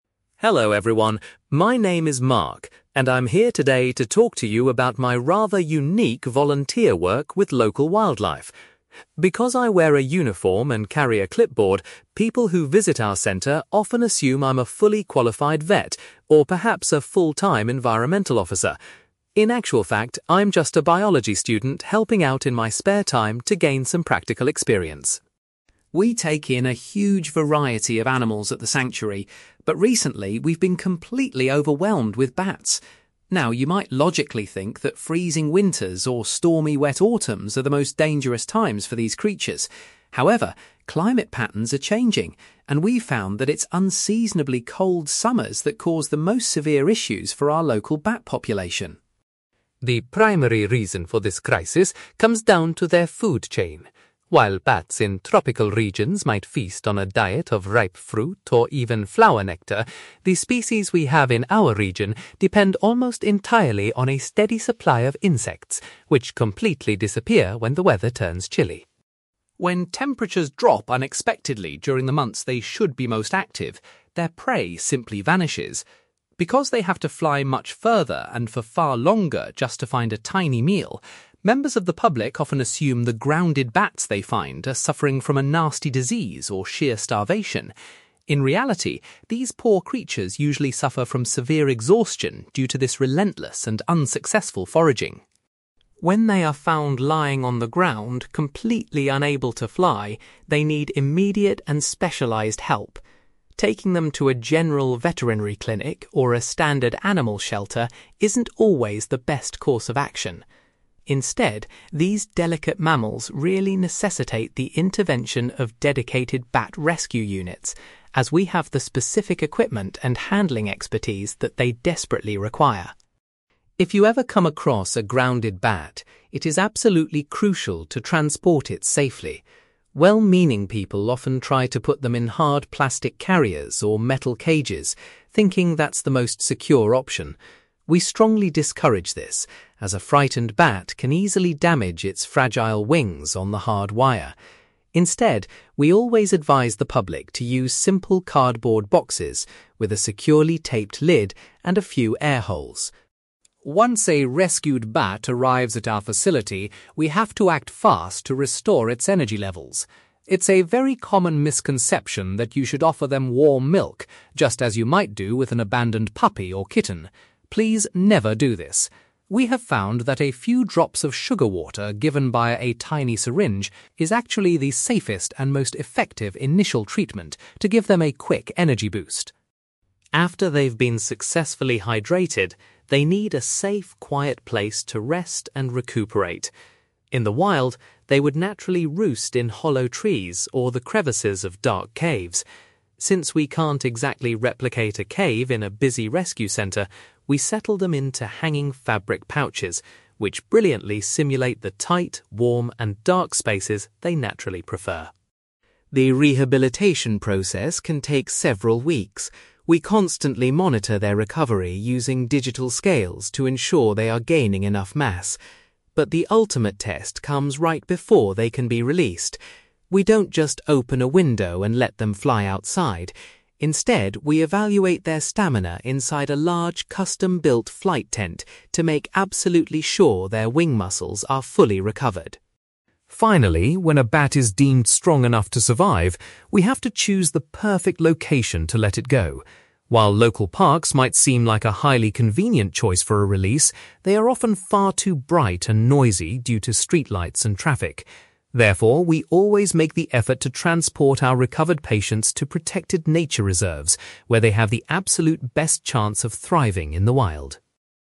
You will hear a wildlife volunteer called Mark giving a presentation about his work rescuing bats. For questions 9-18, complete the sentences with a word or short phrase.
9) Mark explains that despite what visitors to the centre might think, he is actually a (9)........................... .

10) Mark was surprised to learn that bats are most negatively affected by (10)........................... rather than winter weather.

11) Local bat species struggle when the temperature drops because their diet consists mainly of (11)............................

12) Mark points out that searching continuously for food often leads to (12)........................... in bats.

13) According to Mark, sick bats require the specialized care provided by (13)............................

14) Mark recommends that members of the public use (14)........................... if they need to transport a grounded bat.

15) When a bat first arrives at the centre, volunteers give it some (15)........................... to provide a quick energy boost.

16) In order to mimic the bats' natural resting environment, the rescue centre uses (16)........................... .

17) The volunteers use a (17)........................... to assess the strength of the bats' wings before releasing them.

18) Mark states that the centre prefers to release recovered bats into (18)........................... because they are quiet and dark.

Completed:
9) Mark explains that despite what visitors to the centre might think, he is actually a biology student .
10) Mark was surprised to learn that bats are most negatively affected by cold summers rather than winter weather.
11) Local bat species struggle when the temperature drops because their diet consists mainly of insects
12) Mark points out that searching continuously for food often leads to exhaustion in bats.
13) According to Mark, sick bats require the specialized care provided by bat rescue units
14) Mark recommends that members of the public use cardboard boxes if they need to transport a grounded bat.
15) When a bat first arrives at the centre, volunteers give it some sugar water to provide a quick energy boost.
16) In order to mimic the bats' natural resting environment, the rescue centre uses fabric pouches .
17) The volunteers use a flight tent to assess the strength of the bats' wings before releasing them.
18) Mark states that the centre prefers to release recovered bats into nature reserves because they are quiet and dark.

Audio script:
Mark: Hello everyone, my name is Mark, and I'm here today to talk to you about my rather unique volunteer work with local wildlife. Because I wear a uniform and carry a clipboard, people who visit our centre often assume I'm a fully qualified vet, or perhaps a full-time environmental officer. In actual fact, I'm just a biology student helping out in my spare time to gain some practical experience.
We take in a huge variety of animals at the sanctuary, but recently, we've been completely overwhelmed with bats. Now, you might logically think that freezing winters or stormy, wet autumns are the most dangerous times for these creatures. However, climate patterns are changing, and we've found that it's unseasonably cold summers that cause the most severe issues for our local bat population.
The primary reason for this crisis comes down to their food chain. While bats in tropical regions might feast on a diet of ripe fruit or even flower nectar, the species we have in our region depend almost entirely on a steady supply of insects, which completely disappear when the weather turns chilly.
When temperatures drop unexpectedly during the months they should be most active, their prey simply vanishes. Because they have to fly much further and for far longer just to find a tiny meal, members of the public often assume the grounded bats they find are suffering from a nasty disease or sheer starvation. In reality, these poor creatures usually suffer from severe exhaustion due to this relentless and unsuccessful foraging.
When they are found lying on the ground, completely unable to fly, they need immediate and specialized help. Taking them to a general veterinary clinic or a standard animal shelter isn't always the best course of action. Instead, these delicate mammals really necessitate the intervention of dedicated bat rescue units, as we have the specific equipment and handling expertise that they desperately require.
If you ever come across a grounded bat, it is absolutely crucial to transport it safely. Well-meaning people often try to put them in hard plastic carriers or metal cages, thinking that's the most secure option. We strongly discourage this, as a frightened bat can easily damage its fragile wings on the hard wire. Instead, we always advise the public to use simple cardboard boxes with a securely taped lid and a few air holes.
Once a rescued bat arrives at our facility, we have to act fast to restore its energy levels. It's a very common misconception that you should offer them warm milk, just as you might do with an abandoned puppy or kitten. Please never do this! We have found that a few drops of sugar water given via a tiny syringe is actually the safest and most effective initial treatment to give them a quick energy boost.
After they've been successfully hydrated, they need a safe, quiet place to rest and recuperate. In the wild, they would naturally roost in hollow trees or the crevices of dark caves. Since we can't exactly replicate a cave in a busy rescue centre, we settle them into hanging fabric pouches, which brilliantly simulate the tight, warm, and dark spaces they naturally prefer.
The rehabilitation process can take several weeks. We constantly monitor their recovery using digital scales to ensure they are gaining enough mass. But the ultimate test comes right before they can be released. We don't just open a window and let them fly outside; instead, we evaluate their stamina inside a large, custom-built flight tent to make absolutely sure their wing muscles are fully recovered.
Finally, when a bat is deemed strong enough to survive, we have to choose the perfect location to let it go. While local parks might seem like a highly convenient choice for a release, they are often far too bright and noisy due to streetlights and traffic. Therefore, we always make the effort to transport our recovered patients to protected nature reserves, where they have the absolute best chance of thriving in the wild.

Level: B2